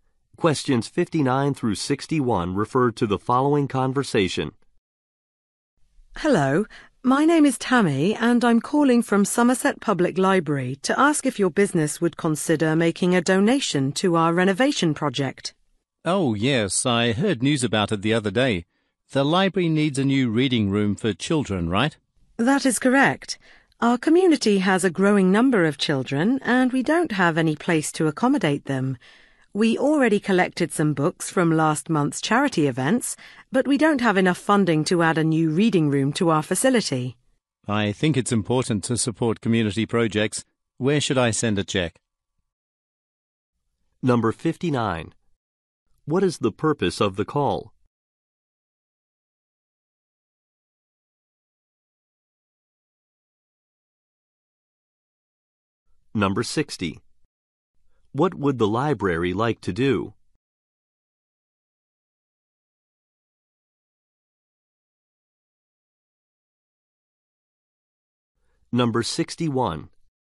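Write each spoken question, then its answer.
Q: What is the purpose of the call?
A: To ask for a donation

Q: What would the library like to do?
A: Add a new children's reading room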